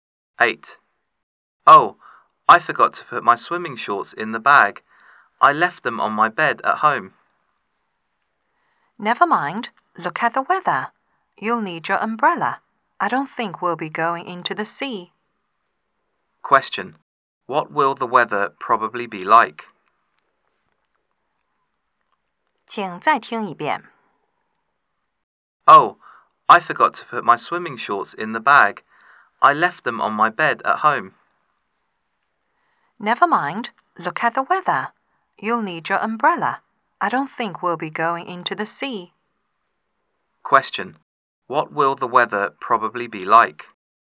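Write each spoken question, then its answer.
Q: What will the weather probably be like?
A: Rainy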